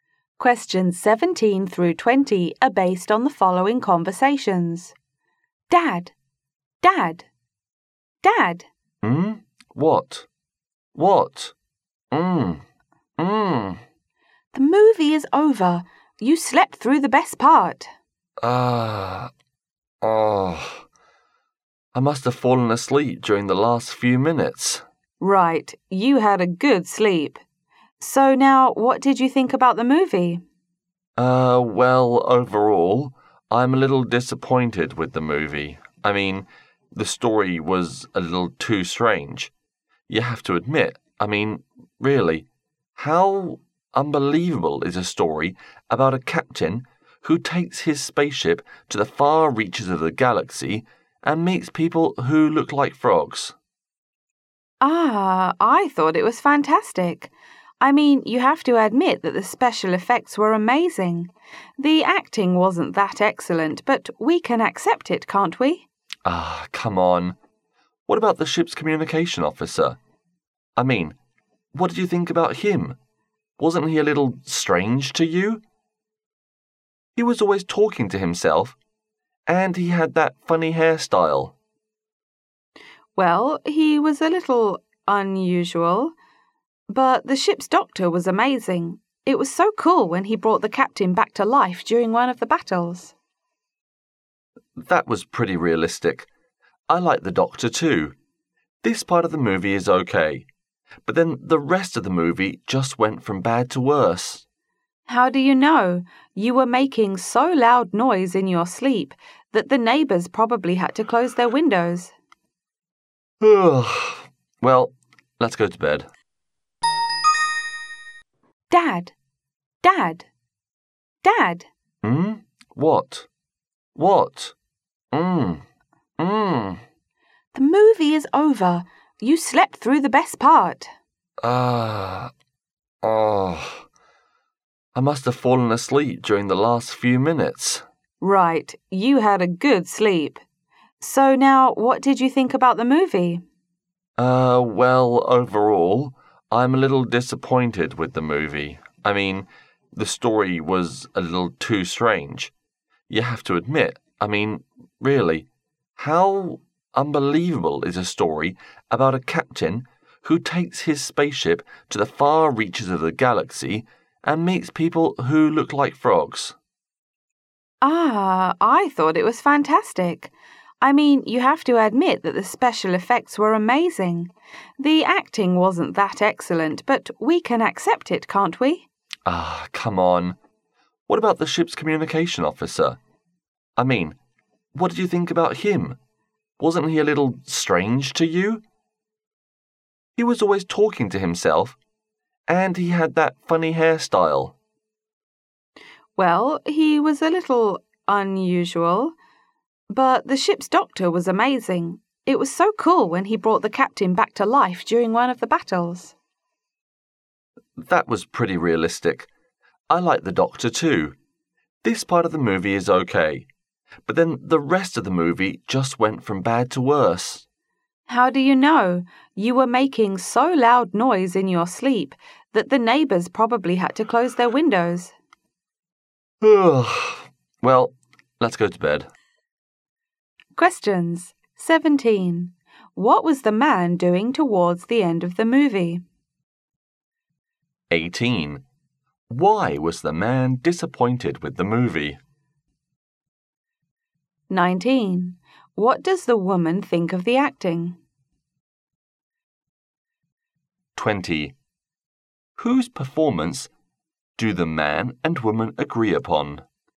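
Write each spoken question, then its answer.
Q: What was the man doing towards the end of the movie?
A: Sleeping

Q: Why was the man disappointed with the movie?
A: The story was too strange

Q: What does the woman think of the acting?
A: It wasn't excellent but was acceptable

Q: Whose performance do the man and woman agree upon?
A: The ship's doctor's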